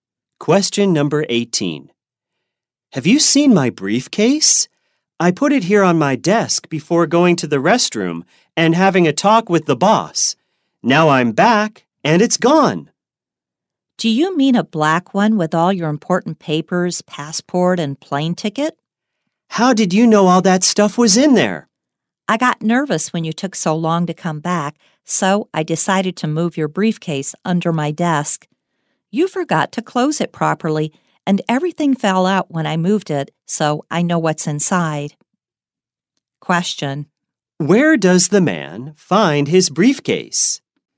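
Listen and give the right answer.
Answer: Under the woman's desk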